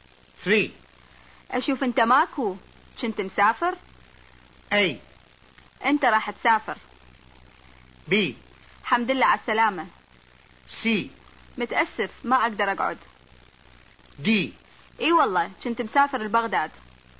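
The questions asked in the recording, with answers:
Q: أشوف أنت ماكو كنت مسافر.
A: D: إي والله كنت مسافر لبغداد.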